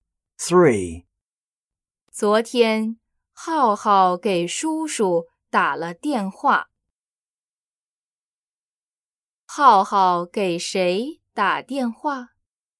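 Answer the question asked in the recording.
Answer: 叔叔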